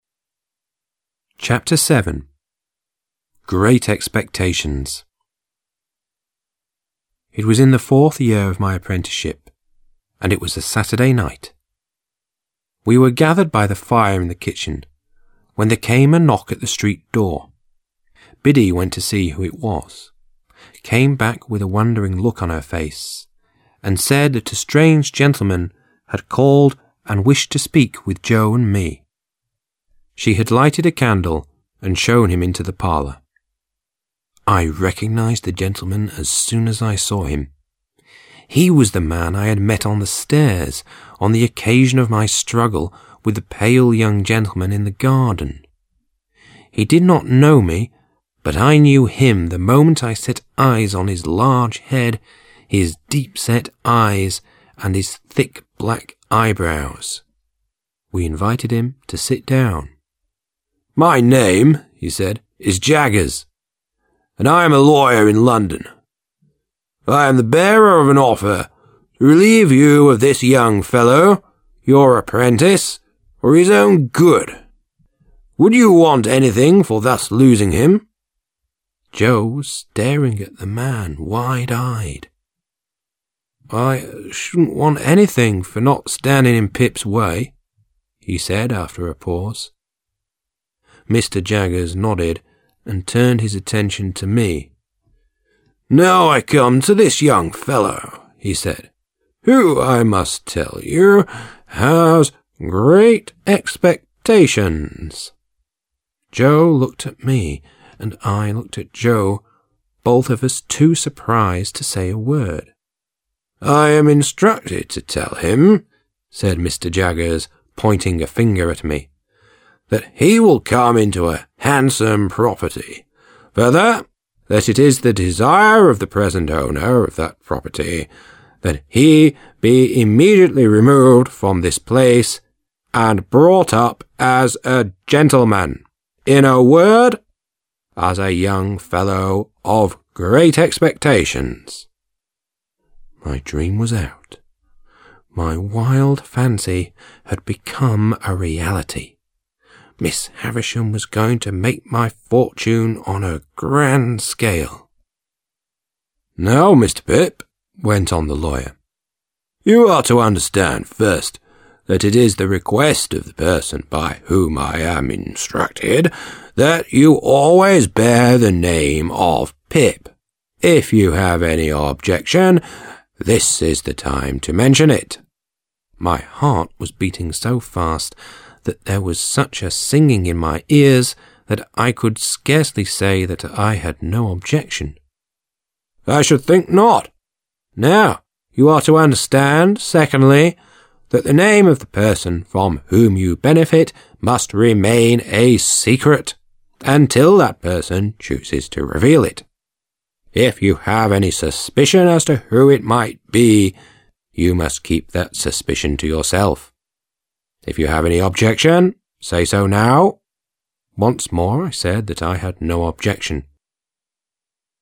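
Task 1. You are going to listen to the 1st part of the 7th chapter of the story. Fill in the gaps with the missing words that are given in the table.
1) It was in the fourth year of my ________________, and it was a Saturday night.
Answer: apprenticeship

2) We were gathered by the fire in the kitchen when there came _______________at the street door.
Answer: a knock

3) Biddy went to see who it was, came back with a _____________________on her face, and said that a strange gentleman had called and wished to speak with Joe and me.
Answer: wondering look

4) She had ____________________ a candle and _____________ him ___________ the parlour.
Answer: lighted; shown; into

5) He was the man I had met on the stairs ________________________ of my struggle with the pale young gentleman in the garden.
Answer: on the occasion

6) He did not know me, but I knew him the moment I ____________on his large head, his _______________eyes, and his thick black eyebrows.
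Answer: set eyes; deep-set

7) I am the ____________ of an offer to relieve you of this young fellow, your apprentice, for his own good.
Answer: bearer

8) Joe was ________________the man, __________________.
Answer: staring at; wide-eyed

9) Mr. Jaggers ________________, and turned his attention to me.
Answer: nodded

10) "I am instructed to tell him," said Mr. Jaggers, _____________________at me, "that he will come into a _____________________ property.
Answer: pointing a finger; handsome

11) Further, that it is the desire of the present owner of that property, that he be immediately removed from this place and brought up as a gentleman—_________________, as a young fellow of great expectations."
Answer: in a word

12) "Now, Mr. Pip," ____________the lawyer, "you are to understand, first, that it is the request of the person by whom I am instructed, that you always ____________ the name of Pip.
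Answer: went on; bear

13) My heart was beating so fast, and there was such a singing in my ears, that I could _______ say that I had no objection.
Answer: scarcely

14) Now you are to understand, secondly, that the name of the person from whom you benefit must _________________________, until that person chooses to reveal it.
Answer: remain a secret

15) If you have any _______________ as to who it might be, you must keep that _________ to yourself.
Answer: suspicion; suspicion

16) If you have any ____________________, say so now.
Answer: objection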